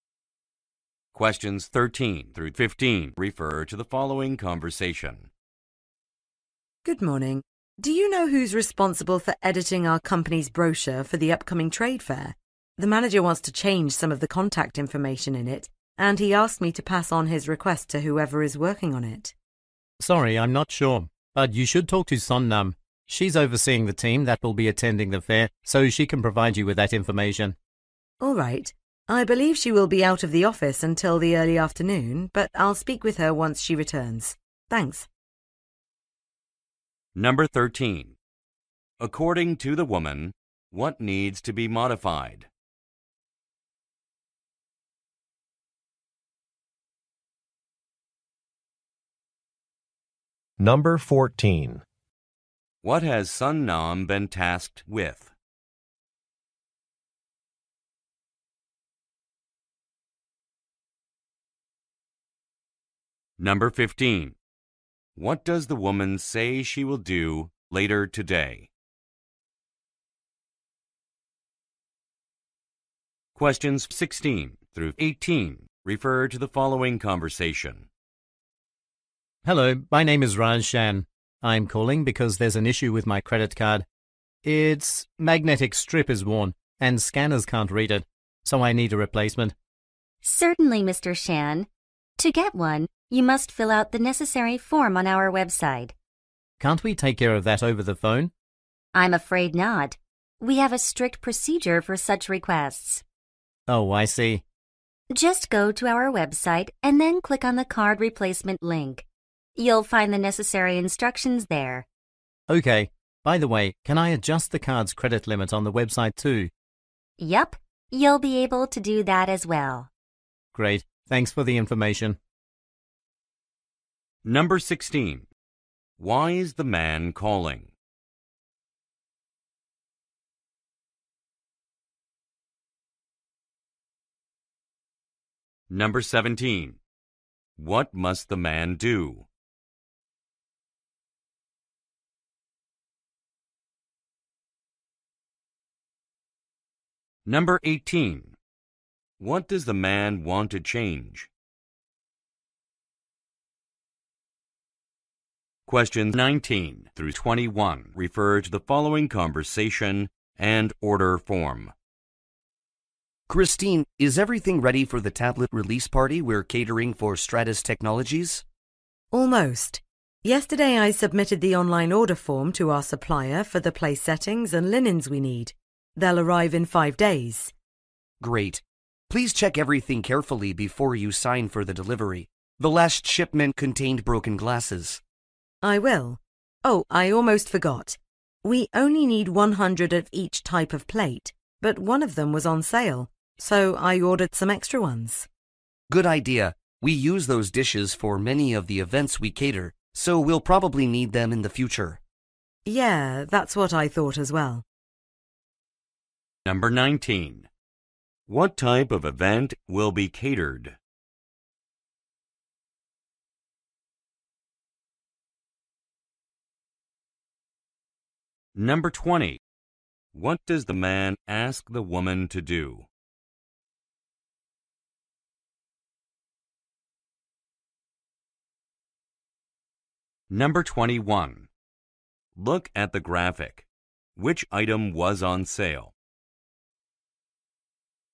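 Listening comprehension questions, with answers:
คําสั่ง: ฟังบทสนทนา และเลือกคําตอบที่ตรงหรือสอดคล้องกับบทสนทนามากที่สุด (คําถามและตัวเลือกของแต่ละข้ออยู่ในไฟล์เสียงแล้ว)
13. According to the woman, what needs to be modified?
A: Contact information in the company's brochure

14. What has Sun Nam been tasked with?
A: Overseeing the team attending the trade fair

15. What does the woman say she will do later today?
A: Speak with Sun Nam when she returns

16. Why is the man calling?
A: To get a replacement credit card

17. What must the man do?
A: Fill out a form on the website

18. What does the man want to change?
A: His card's credit limit

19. What type of event will be catered?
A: A product (tablet) release party

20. What does the man ask the woman to do?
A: Check the delivery carefully before signing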